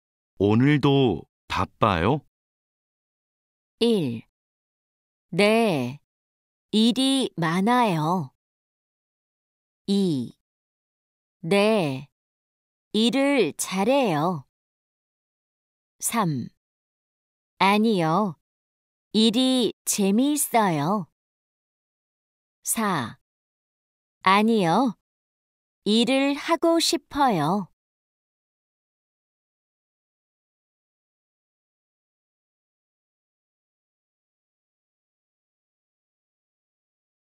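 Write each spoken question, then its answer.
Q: 오늘도 바빠요?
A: 1: 네, 일이 많아요.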